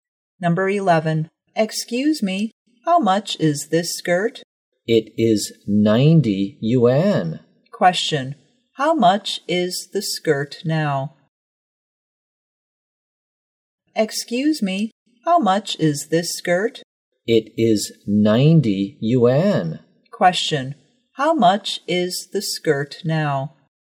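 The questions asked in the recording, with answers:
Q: How much is the skirt now?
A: 90 yuan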